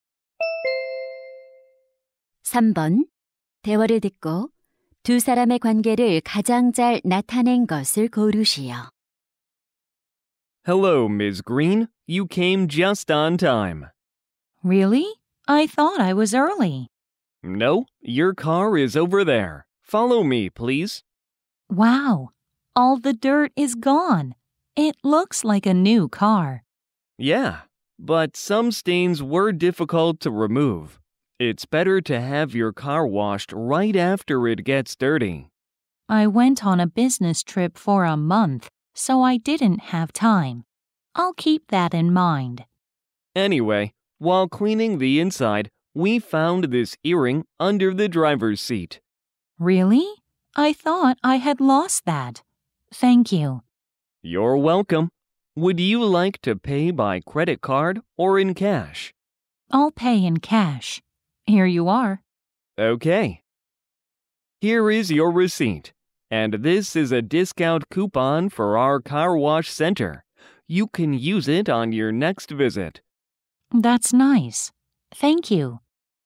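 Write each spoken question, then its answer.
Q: 대화를 듣고 두 사람의 관계를 가장 잘 나타낸 것을 고르시오.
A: 세차장 직원 - 고객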